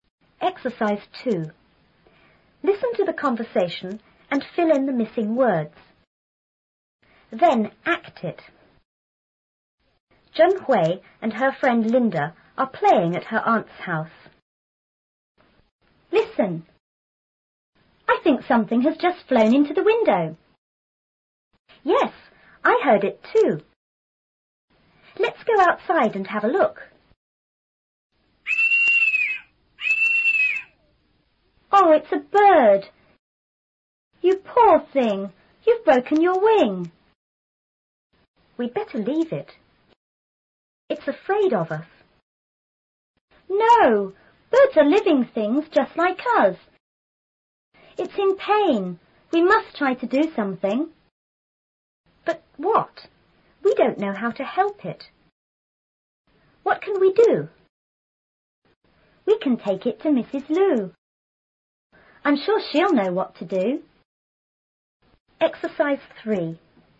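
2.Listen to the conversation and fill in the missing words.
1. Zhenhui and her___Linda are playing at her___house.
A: friend / aunt's

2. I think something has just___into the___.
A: flown / window

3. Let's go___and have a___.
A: outside / look

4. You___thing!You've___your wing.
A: poor / broken

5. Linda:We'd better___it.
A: leave

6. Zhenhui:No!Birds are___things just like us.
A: living

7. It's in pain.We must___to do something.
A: try

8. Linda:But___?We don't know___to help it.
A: what / how

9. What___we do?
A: can

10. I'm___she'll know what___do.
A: sure / to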